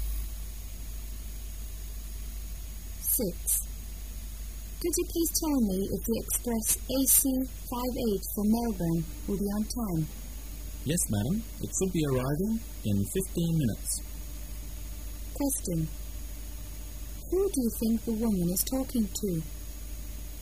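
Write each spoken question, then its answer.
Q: Who do you think the woman is talking to?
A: A railway station clerk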